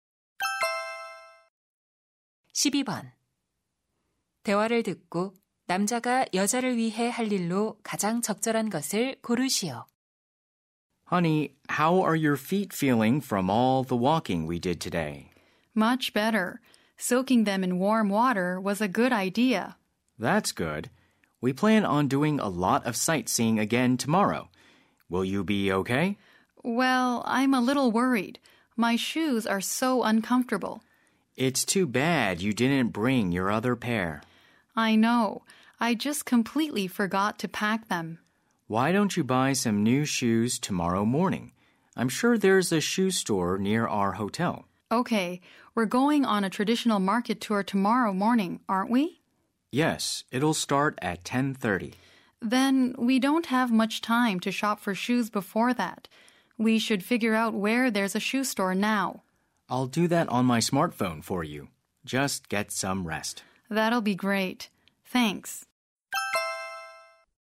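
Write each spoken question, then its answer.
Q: 대화를 듣고 남자가 여자를 위해 할 일로 가장 적절한 것을 고르시오.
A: 스마트폰으로 신발 가게 찾아보기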